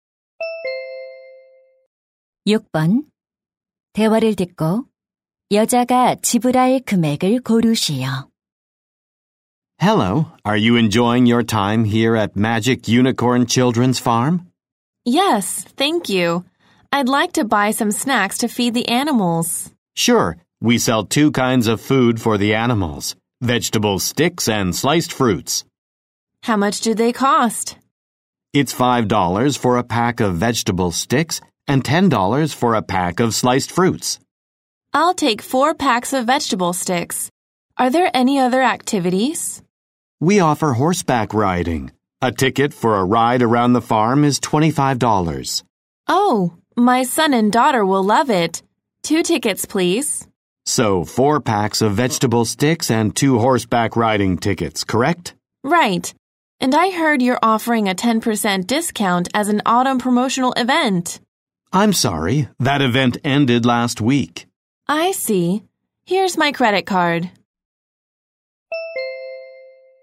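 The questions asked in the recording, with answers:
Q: 대화를 듣고 여자가 지불할 금액을 고르시오.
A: $70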